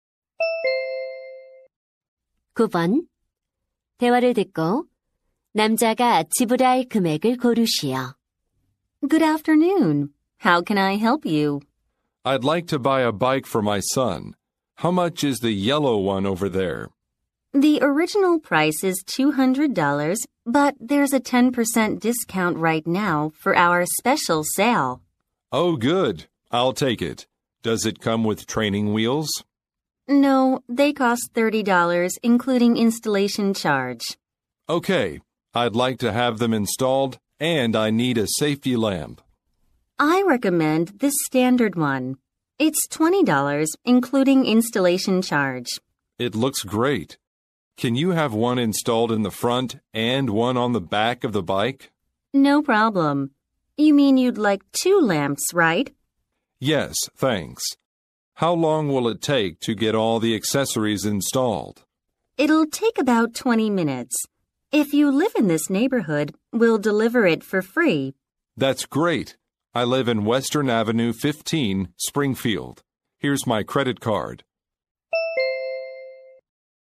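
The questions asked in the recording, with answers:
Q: 대화를 듣고 남자가 지불할 금액을 고르시오.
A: $250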